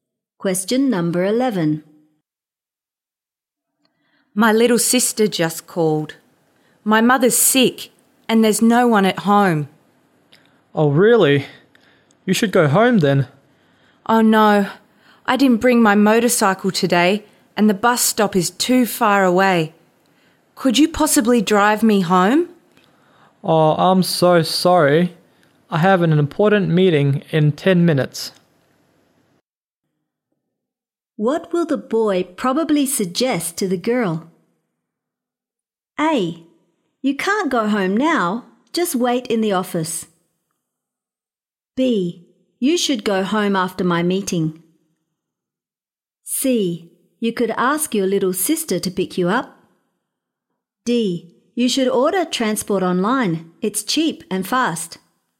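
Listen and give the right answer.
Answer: D: You should order transport online. It's cheap and fast.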